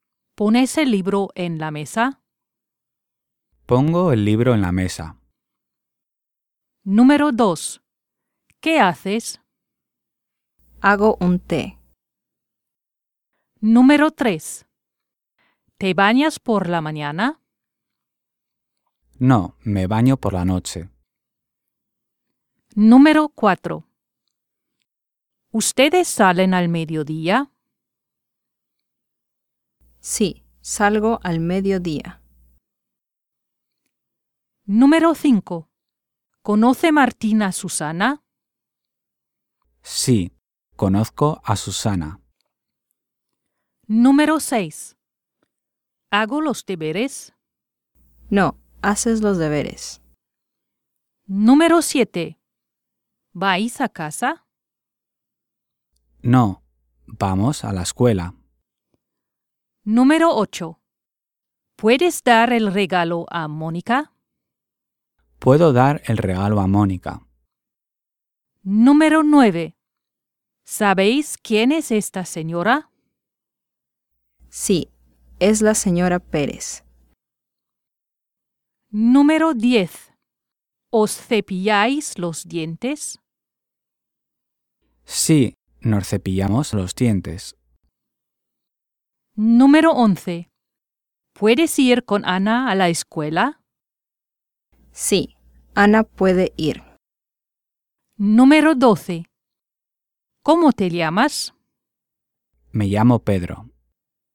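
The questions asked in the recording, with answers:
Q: ¿Pones el libro en la mesa?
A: lógica

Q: ¿Qué haces?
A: lógica

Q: ¿Te bañas por la mañana?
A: lógica

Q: ¿Ustedes salen al mediodía?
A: ilógica

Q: ¿Conoce Martín a Susana?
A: ilógica

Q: ¿Vais a casa?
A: lógica

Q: ¿Puedes dar el regalo a Mónica?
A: lógica

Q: ¿Sabéis quién es esta señora?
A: lógica

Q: ¿Os cepilláis los dientes?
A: lógica

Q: ¿Puedes ir con Ana a la escuela?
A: ilógica

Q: ¿Cómo te llamas?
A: lógica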